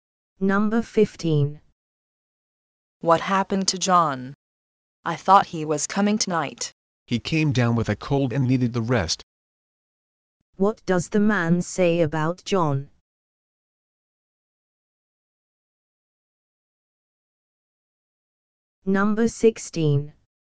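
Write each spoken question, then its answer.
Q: What does the man say about John?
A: John has a cold and needed rest.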